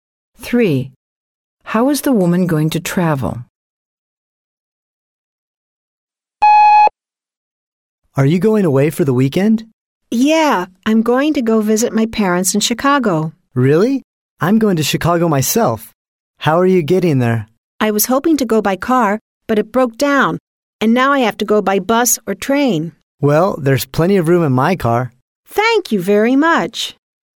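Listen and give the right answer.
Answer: By car, in the man's car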